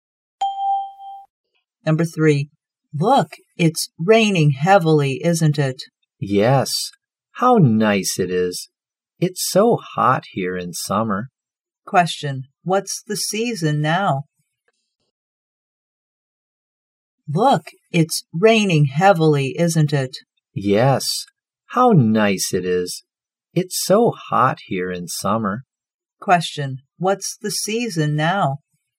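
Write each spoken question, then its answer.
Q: what's the season now?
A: Summer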